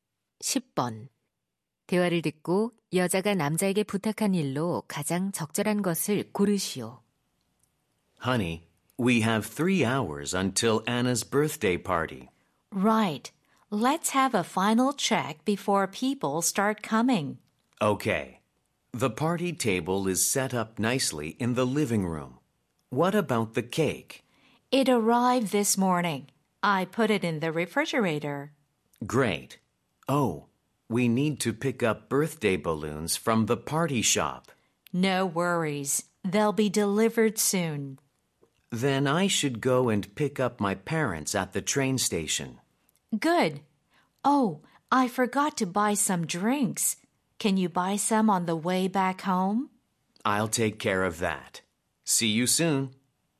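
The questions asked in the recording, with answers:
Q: 대화를 듣고 여자가 남자에게 부탁한 일로 가장 적절한 것을 고르시오.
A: 음료 사 오기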